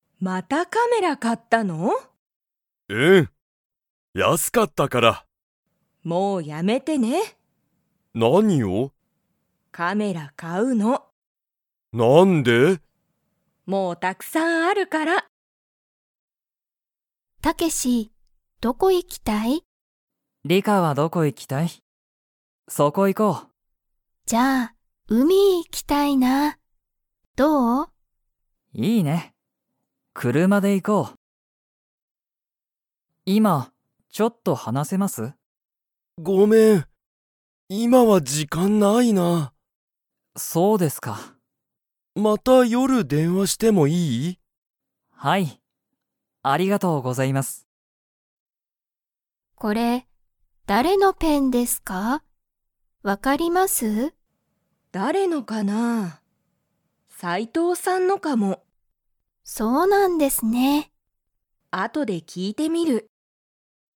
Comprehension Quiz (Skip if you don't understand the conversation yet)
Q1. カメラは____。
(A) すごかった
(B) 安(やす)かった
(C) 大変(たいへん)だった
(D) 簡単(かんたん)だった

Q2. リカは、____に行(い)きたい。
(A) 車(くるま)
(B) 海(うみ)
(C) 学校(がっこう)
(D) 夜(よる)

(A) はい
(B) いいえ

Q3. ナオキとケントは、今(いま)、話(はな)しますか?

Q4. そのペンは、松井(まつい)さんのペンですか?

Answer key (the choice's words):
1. 安(やす)かった
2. 海(うみ)
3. いいえ
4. いいえ

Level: Level 1